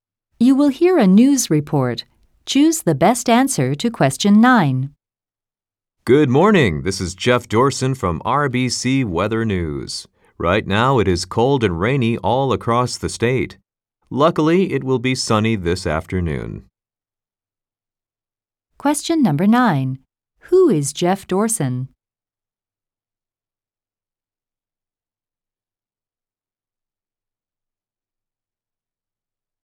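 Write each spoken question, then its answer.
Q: Who is Jeff Dorson?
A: A weather news reporter (from RBC Weather News)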